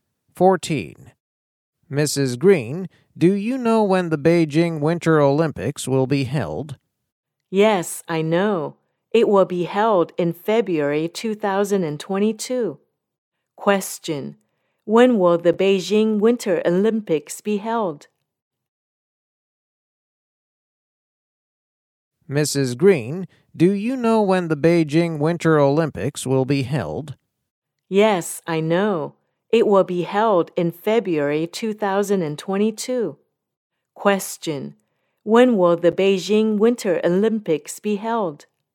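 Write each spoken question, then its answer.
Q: When will the Beijing Winter Olympics be held?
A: In February 2022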